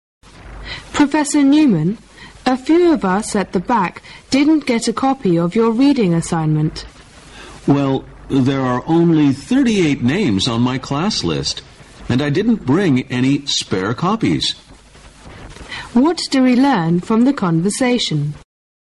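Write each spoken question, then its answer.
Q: What do we learn from the conversation?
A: More students attended the class than were on the professor's list

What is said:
[听力原文] W: Professor Newman, a few of us at the back didn't get a copy of your reading assignment. M: Well, there're only 38 names on my class list. And I didn't bring any spare copies. Q: What do we learn from the conversation?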